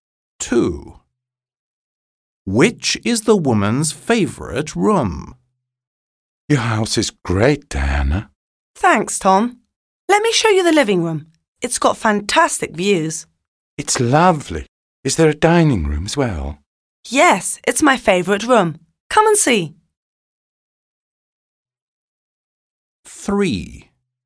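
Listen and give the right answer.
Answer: The dining room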